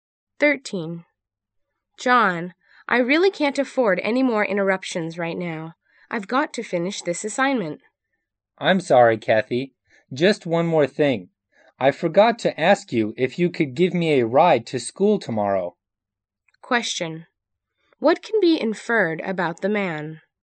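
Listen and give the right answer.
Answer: He wants a ride to school tomorrow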